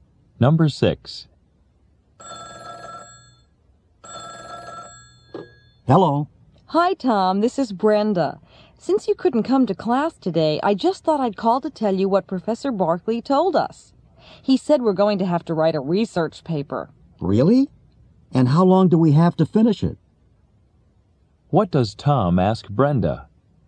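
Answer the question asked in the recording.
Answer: How long they have to finish the research paper.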